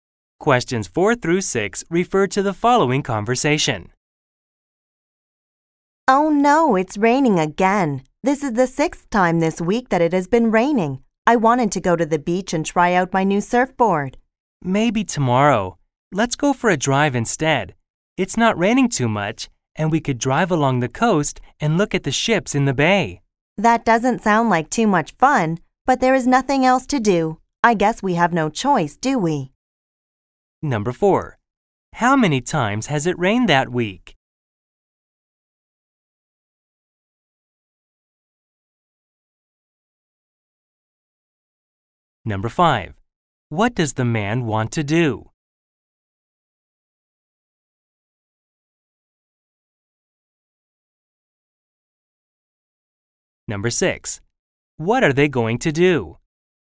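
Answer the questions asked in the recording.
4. Six times.
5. Go to the beach and try out his new surfboard.
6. Go for a drive along the coast.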